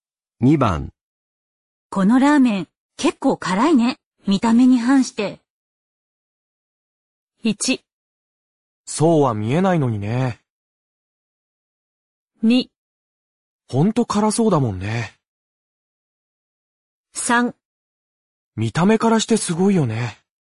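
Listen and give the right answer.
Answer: 1: そうは見えないのにね。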